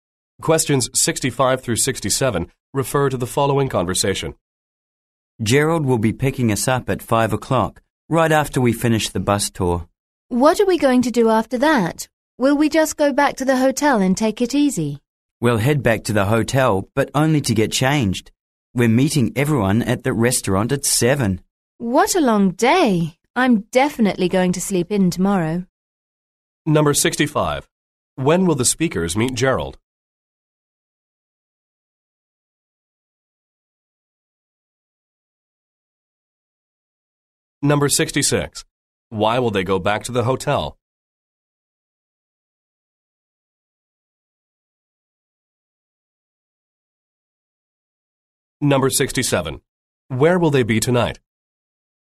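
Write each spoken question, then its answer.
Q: When will the speakers meet Gerald?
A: At 5 o'clock, after the bus tour

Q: Why will they go back to the hotel?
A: To get changed

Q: Where will they be tonight?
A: At a restaurant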